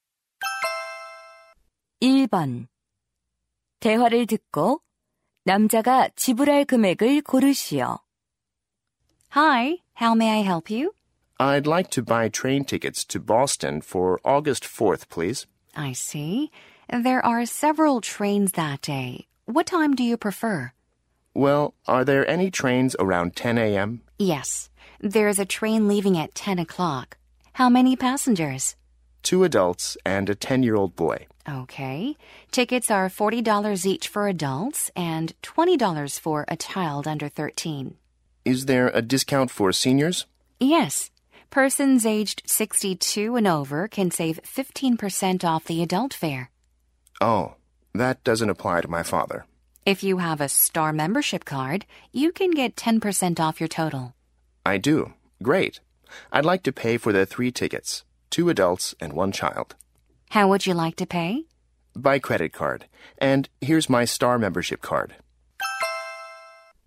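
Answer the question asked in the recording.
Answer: $90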